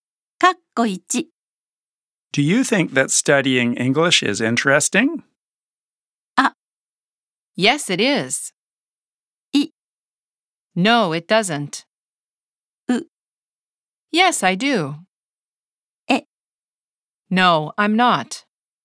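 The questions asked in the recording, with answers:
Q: Do you think that studying English is interesting?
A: う: Yes, I do.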